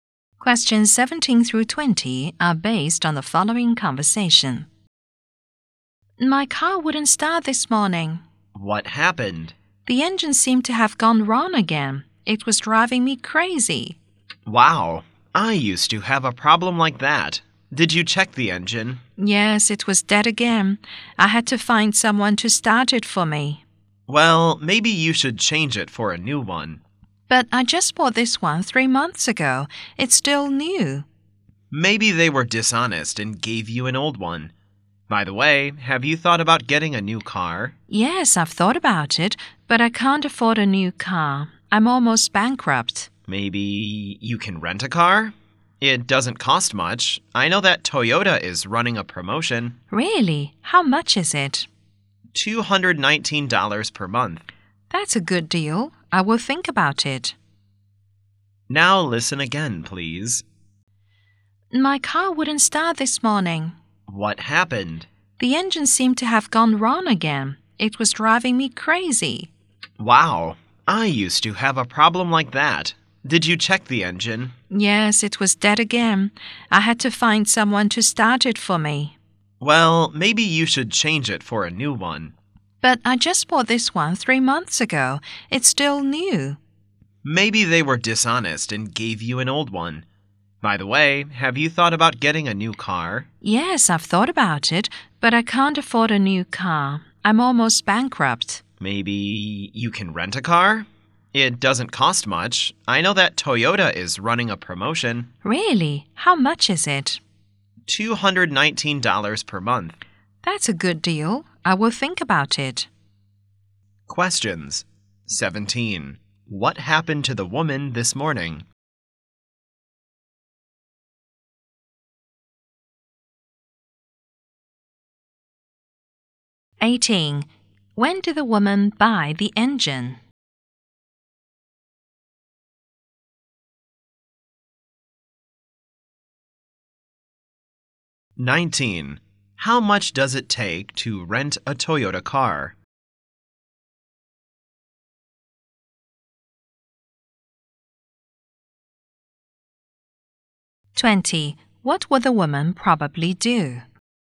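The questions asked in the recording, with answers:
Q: What happened to the woman this morning?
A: Her car wouldn't start

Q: When did the woman buy the engine?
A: Three months ago

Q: How much does it take to rent a Toyota car?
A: $219 per month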